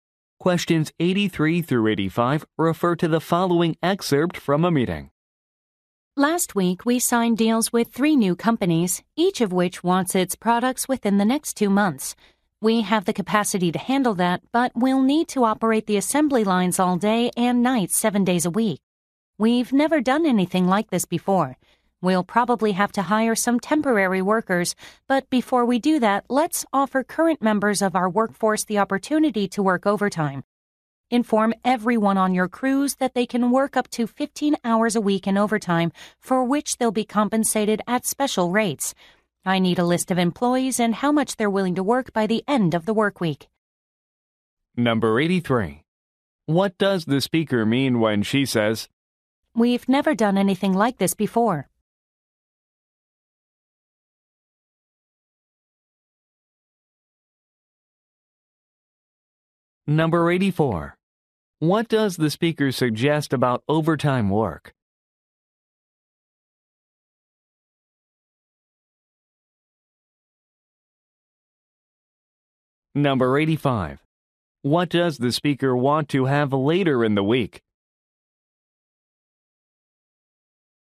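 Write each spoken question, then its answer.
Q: What does the speaker suggest about overtime work?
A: It will be paid at special rates, up to 15 hours a week

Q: What does the speaker want to have later in the week?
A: A list of employees and how much overtime they will work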